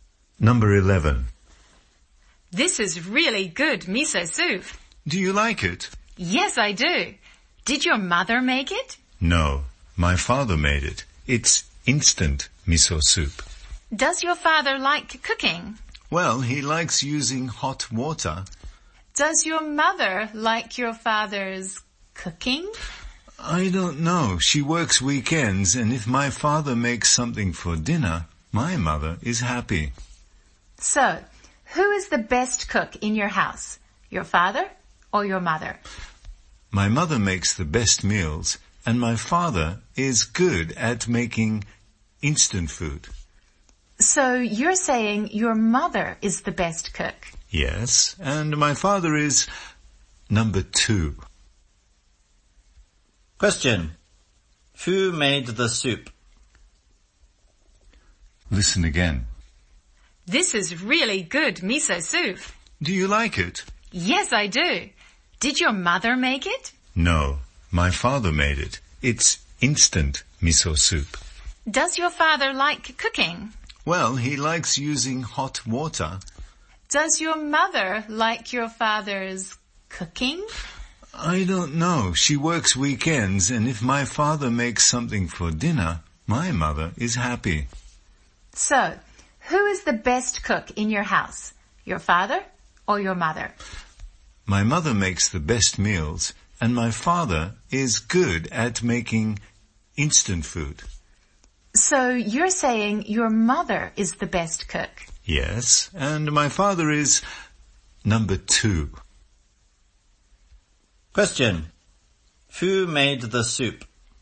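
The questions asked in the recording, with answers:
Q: Who made the soup?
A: The boy's father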